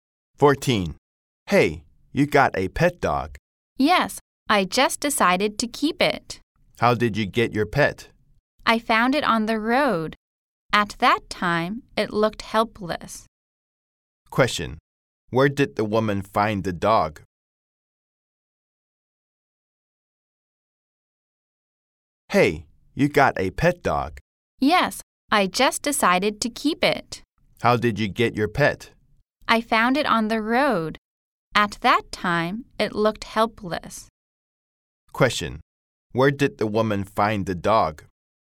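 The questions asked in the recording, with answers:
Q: Question: Where did the woman find the dog?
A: On the road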